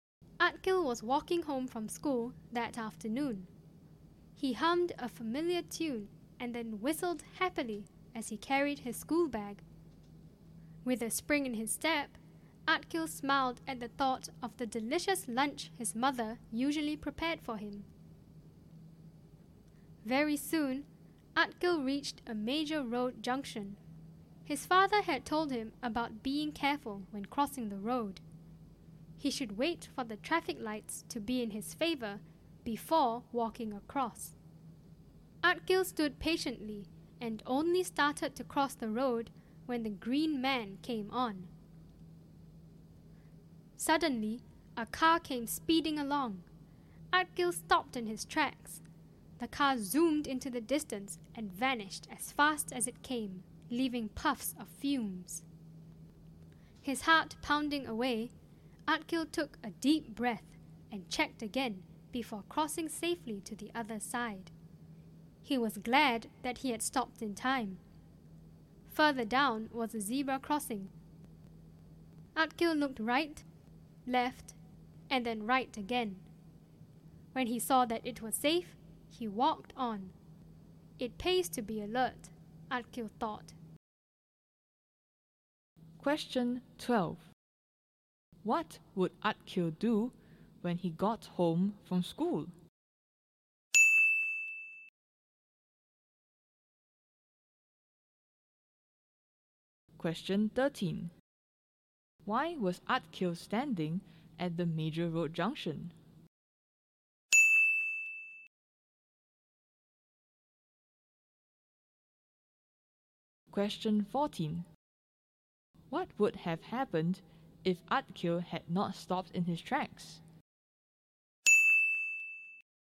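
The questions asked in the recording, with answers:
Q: What would Atkil do when he got home from school?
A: Have the delicious lunch his mother prepared

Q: Why was Atkil standing at the major road junction?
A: He was waiting for the traffic lights (green man) before crossing

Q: What would have happened if Atkil had not stopped in his tracks?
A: He would have been hit by the speeding car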